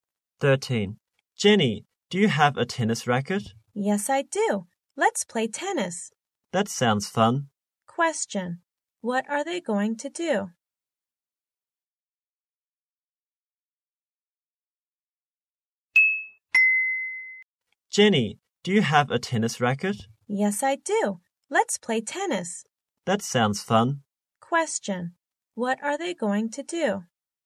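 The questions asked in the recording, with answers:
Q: What are they going to do?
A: Play tennis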